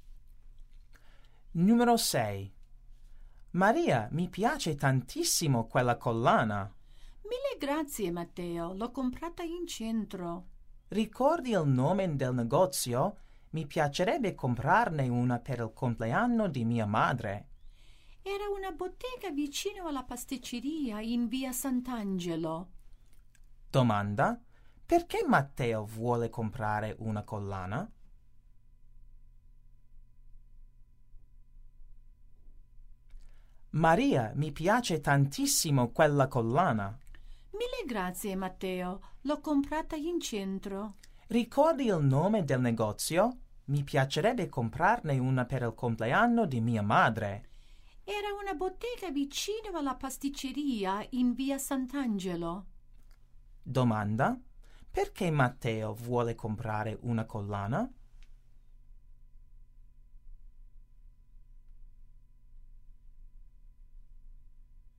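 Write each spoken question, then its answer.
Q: perché Matteo vuole comprare una collana?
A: Per il compleanno di sua madre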